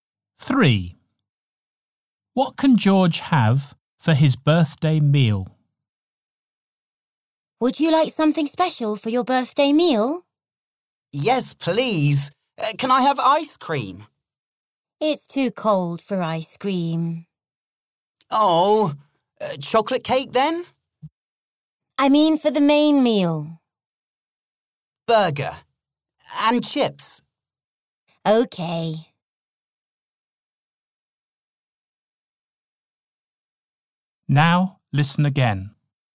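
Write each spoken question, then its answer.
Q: What can George have for his birthday meal?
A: Burger and chips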